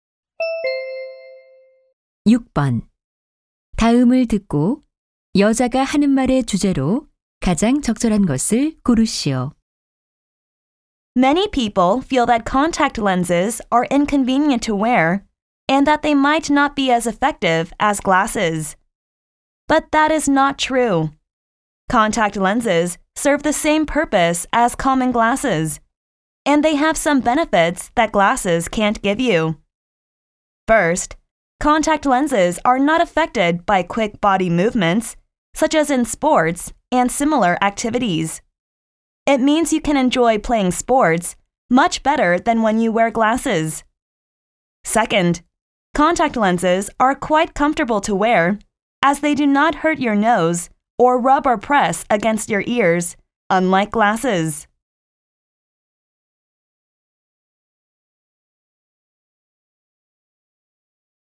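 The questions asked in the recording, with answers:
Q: 다음을 듣고 여자가 하는 말의 주제로 가장 적절한 것을 고르시오.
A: 콘택트렌즈의 장점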